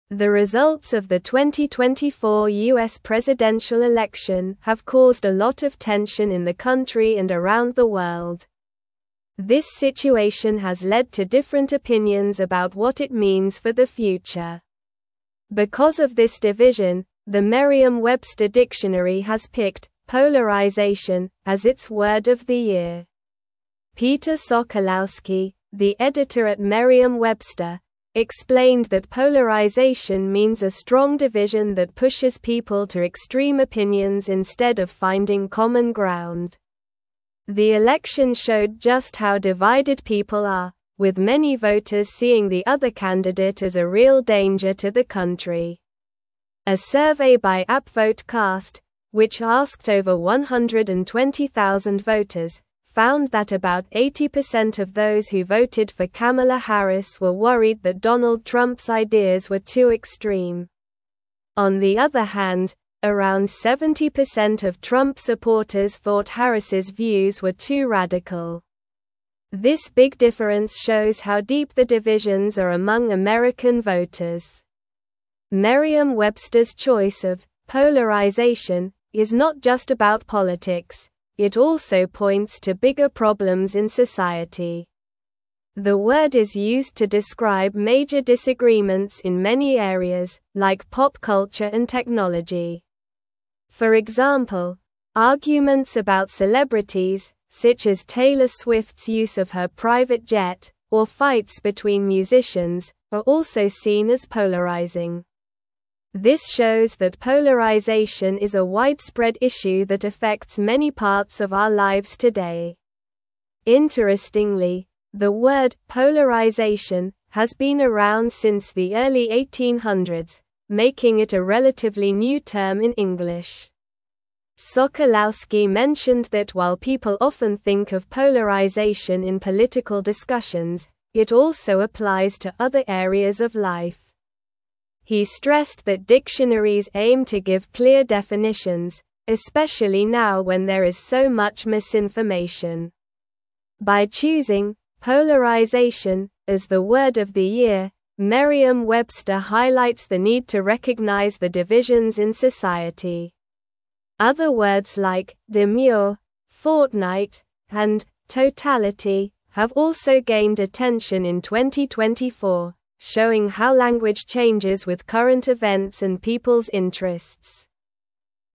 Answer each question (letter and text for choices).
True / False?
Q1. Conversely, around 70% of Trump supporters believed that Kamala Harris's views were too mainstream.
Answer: False

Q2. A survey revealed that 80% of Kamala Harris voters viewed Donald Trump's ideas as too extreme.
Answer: True

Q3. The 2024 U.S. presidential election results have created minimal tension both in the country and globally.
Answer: False

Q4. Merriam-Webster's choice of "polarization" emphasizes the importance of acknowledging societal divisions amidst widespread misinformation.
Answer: True

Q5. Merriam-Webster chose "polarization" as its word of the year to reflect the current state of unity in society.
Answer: False

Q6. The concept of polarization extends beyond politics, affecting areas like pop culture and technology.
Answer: True

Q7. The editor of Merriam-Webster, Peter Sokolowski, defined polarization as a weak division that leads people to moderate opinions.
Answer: False

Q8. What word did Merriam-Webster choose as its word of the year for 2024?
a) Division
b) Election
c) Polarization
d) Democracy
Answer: c) Polarization

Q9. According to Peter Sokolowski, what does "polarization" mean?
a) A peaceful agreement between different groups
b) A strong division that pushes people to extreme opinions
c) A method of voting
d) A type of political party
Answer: b) A strong division that pushes people to extreme opinions

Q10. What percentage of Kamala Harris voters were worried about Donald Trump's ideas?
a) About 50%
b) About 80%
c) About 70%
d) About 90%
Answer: b) About 80%

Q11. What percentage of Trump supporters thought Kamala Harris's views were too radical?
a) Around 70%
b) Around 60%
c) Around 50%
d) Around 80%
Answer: a) Around 70%

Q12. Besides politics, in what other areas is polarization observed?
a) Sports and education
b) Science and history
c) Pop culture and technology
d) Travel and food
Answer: c) Pop culture and technology

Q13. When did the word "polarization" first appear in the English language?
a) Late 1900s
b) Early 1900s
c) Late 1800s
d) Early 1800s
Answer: d) Early 1800s

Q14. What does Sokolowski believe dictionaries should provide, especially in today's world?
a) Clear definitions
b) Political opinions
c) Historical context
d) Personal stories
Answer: a) Clear definitions

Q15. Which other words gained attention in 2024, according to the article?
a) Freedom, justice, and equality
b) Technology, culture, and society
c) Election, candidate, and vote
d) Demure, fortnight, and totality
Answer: d) Demure, fortnight, and totality

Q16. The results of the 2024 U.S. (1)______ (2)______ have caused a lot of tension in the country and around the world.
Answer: presidential

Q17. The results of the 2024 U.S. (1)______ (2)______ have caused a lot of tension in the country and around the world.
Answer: election

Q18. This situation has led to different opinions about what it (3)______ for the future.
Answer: means

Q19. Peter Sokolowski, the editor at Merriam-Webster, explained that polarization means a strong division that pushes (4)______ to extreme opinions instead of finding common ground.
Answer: people

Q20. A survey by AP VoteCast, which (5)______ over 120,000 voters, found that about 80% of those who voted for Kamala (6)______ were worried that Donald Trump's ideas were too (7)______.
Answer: asked

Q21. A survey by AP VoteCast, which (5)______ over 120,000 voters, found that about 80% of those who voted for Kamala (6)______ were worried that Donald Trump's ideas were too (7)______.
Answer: Harris

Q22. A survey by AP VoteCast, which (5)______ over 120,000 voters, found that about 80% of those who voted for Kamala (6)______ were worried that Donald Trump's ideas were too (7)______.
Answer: extreme

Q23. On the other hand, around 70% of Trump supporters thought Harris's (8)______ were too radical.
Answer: views

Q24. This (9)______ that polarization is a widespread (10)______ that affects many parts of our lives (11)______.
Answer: shows

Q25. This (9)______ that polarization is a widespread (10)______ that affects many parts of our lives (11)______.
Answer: issue

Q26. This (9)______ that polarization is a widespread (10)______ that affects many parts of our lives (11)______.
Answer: today

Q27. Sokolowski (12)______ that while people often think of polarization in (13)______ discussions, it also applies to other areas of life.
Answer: mentioned

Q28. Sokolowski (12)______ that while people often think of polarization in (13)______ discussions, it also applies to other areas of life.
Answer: political

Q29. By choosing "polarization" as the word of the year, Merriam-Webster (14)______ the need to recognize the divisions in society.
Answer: highlights

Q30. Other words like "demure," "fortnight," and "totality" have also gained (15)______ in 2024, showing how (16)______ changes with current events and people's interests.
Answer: attention

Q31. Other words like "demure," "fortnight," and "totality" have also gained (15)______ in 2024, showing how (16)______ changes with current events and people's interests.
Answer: language

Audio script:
The results of the 2024 U.S. presidential election have caused a lot of tension in the country and around the world. This situation has led to different opinions about what it means for the future. Because of this division, the Merriam-Webster dictionary has picked "polarization" as its word of the year. Peter Sokolowski, the editor at Merriam-Webster, explained that polarization means a strong division that pushes people to extreme opinions instead of finding common ground.
The election showed just how divided people are, with many voters seeing the other candidate as a real danger to the country. A survey by AP VoteCast, which asked over 120,000 voters, found that about 80% of those who voted for Kamala Harris were worried that Donald Trump's ideas were too extreme. On the other hand, around 70% of Trump supporters thought Harris's views were too radical. This big difference shows how deep the divisions are among American voters.
Merriam-Webster's choice of "polarization" is not just about politics; it also points to bigger problems in society. The word is used to describe major disagreements in many areas, like pop culture and technology. For example, arguments about celebrities, such as Taylor Swift's use of her private jet, or fights between musicians, are also seen as polarizing. This shows that polarization is a widespread issue that affects many parts of our lives today.
Interestingly, the word "polarization" has been around since the early 1800s, making it a relatively new term in English. Sokolowski mentioned that while people often think of polarization in political discussions, it also applies to other areas of life. He stressed that dictionaries aim to give clear definitions, especially now when there is so much misinformation. By choosing "polarization" as the word of the year, Merriam-Webster highlights the need to recognize the divisions in society. Other words like "demure," "fortnight," and "totality" have also gained attention in 2024, showing how language changes with current events and people's interests.

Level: Level 3